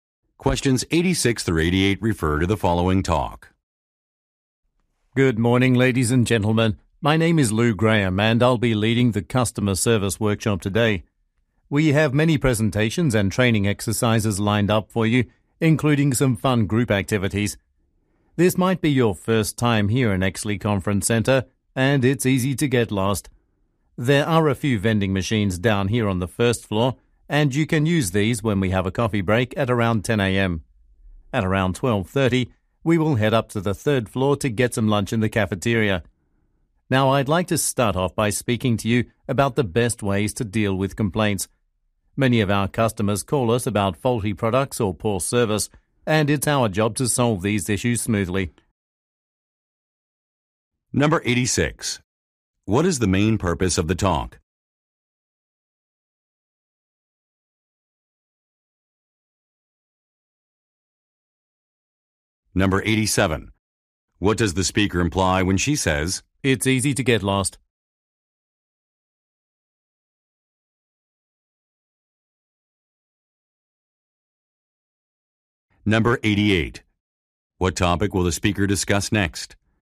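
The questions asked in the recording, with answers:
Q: What is the main purpose of the talk?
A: To start a customer service workshop

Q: What topic will the speaker discuss next?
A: Ways to deal with complaints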